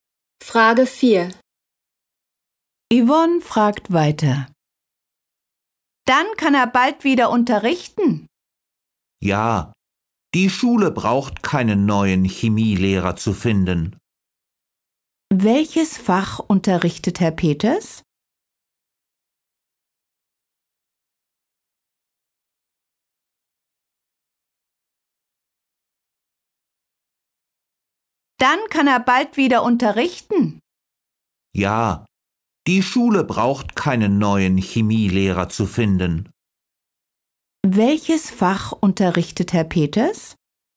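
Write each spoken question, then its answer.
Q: Welches Fach unterrichtet Herr Peters?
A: Chemie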